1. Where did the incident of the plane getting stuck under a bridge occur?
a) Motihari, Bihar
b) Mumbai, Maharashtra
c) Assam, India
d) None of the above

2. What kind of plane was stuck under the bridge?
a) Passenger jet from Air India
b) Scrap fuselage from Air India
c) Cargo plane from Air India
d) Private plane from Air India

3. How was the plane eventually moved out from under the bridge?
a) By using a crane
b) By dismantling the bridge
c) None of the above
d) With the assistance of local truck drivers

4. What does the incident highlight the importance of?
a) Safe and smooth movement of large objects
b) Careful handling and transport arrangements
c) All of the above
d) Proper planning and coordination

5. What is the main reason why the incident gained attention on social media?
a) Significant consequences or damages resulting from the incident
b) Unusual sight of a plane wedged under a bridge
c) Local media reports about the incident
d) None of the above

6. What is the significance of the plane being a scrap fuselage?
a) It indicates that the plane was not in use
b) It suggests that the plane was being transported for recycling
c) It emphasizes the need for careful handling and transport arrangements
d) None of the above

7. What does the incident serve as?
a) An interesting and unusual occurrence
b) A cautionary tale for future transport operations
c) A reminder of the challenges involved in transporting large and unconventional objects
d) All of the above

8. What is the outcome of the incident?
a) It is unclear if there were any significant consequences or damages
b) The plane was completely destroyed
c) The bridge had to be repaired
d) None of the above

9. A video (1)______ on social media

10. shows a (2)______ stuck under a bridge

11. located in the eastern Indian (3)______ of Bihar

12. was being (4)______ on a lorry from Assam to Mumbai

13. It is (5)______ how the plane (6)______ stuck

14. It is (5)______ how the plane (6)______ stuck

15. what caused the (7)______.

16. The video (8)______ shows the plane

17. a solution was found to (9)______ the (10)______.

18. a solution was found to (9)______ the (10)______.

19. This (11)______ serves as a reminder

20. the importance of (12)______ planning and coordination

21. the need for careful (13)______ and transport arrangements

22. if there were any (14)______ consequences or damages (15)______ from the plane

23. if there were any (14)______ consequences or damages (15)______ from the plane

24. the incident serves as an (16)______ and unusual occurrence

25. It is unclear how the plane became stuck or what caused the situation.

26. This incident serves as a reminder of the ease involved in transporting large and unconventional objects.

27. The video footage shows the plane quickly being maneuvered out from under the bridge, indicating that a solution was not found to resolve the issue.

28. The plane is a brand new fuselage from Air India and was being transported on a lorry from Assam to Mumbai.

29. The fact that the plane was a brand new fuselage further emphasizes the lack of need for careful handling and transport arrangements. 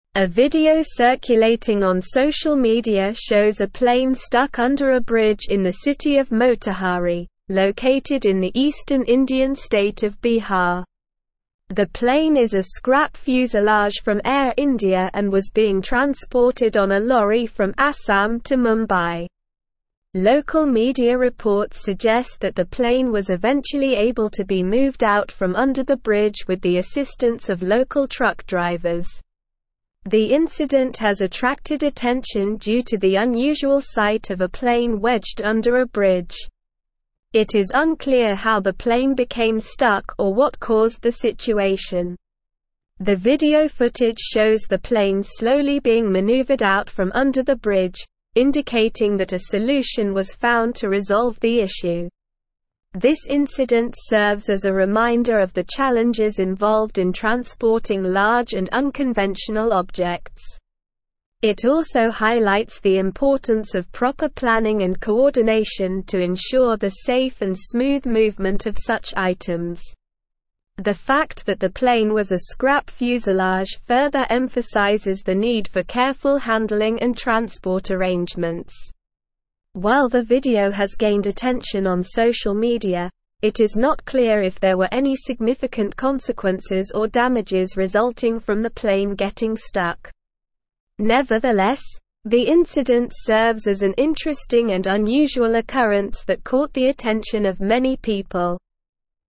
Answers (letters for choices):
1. a
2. b
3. d
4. d
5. b
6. c
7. c
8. a
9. circulating
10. plane
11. state
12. transported
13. unclear
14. became
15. situation
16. footage
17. resolve
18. issue
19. incident
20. proper
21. handling
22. significant
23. resulting
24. interesting
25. True
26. False
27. False
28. False
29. False

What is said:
A video circulating on social media shows a plane stuck under a bridge in the city of Motihari, located in the eastern Indian state of Bihar. The plane is a scrap fuselage from Air India and was being transported on a lorry from Assam to Mumbai. Local media reports suggest that the plane was eventually able to be moved out from under the bridge with the assistance of local truck drivers.
The incident has attracted attention due to the unusual sight of a plane wedged under a bridge. The video footage shows the plane slowly being maneuvered out from under the bridge, indicating that a solution was found to resolve the issue.
This incident serves as a reminder of the challenges involved in transporting large and unconventional objects. It also highlights the importance of proper planning and coordination to ensure the safe and smooth movement of such items. The fact that the plane was a scrap fuselage further emphasizes the need for careful handling and transport arrangements.
While the video has gained attention on social media, it is not clear if there were any significant consequences or damages resulting from the plane getting stuck. Nevertheless, the incident serves as an interesting and unusual occurrence that caught the attention of many people.

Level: Level 4